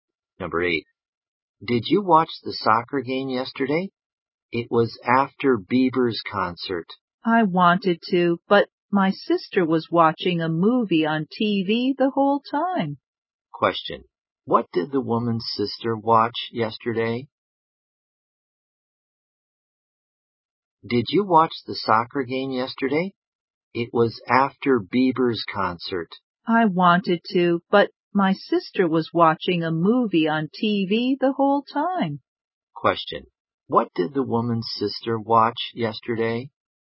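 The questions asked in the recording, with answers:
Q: Question. What did the woman's sister watch yesterday?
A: A movie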